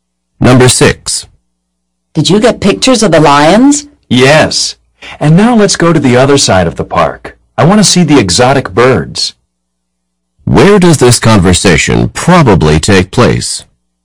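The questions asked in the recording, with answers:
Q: Where does this conversation probably take place?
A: At a zoo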